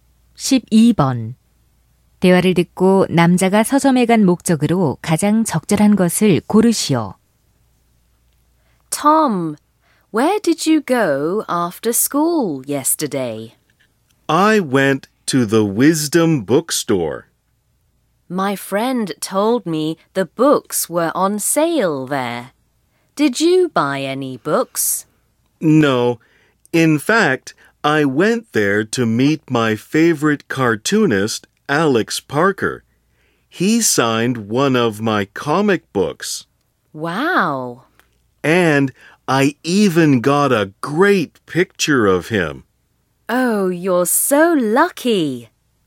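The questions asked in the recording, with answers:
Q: 대화를 듣고 남자가 서점에 간 목적으로 가장 적절한 것을 고르시오.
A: 좋아하는 만화가 Alex Parker를 만나기 위해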